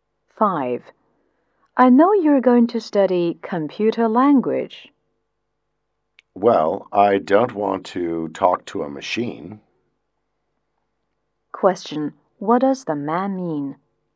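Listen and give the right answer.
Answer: He doesn't want to study computer language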